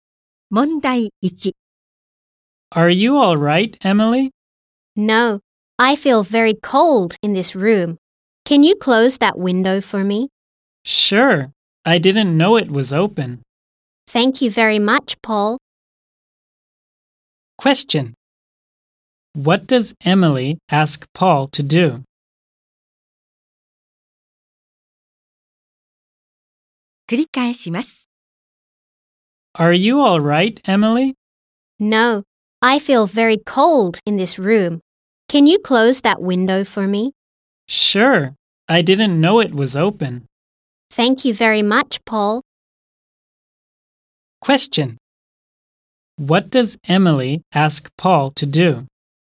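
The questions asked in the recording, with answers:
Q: What does Emily ask Paul to do?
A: To close the window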